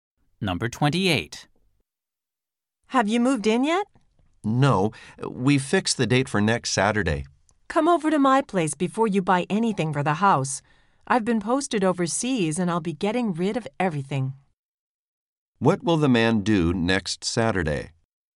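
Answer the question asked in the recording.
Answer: Move into his new house.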